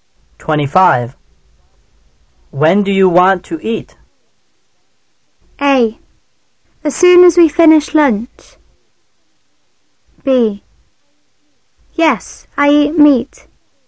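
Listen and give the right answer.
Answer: C: Whenever you're hungry.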